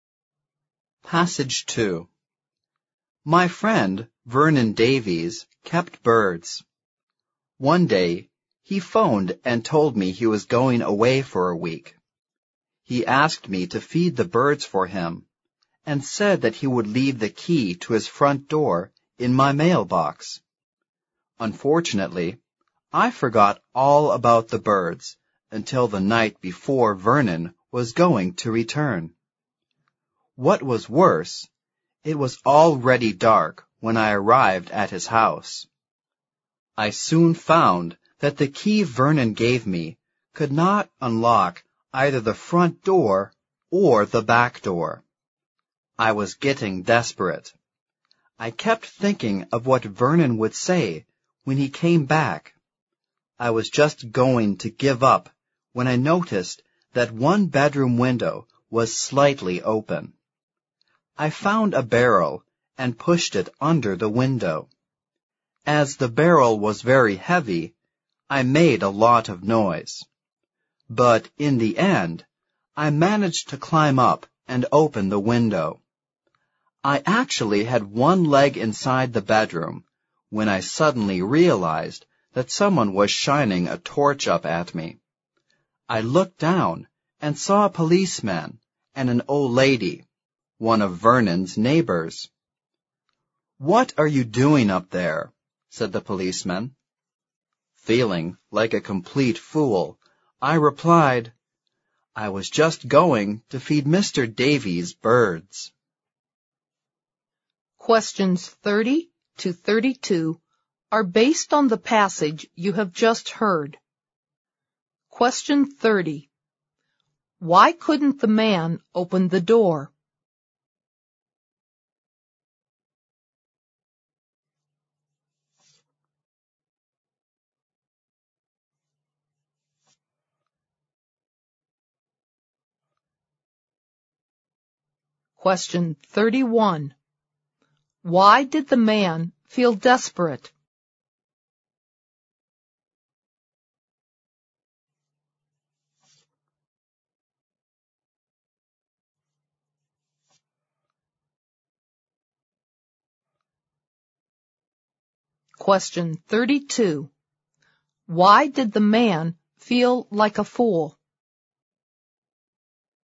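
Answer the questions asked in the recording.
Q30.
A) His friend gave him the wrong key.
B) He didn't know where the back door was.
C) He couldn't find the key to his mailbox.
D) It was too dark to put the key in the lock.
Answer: A) His friend gave him the wrong key.
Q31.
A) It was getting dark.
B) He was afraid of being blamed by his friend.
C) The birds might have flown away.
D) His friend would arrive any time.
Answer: B) He was afraid of being blamed by his friend.
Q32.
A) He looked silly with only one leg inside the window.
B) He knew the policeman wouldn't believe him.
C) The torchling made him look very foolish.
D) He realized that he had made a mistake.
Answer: A) He looked silly with only one leg inside the window.

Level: 四级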